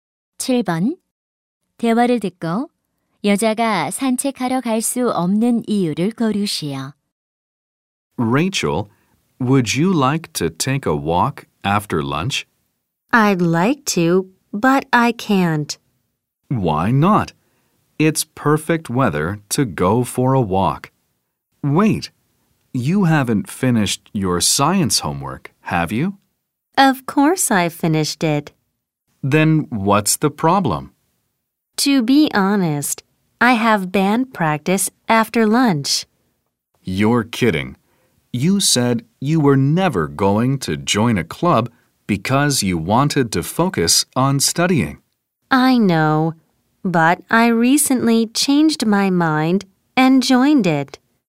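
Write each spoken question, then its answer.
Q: 대화를 듣고 여자가 산책하러 갈 수 없는 이유를 고르시오.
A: 점심 후에 밴드 연습이 있어서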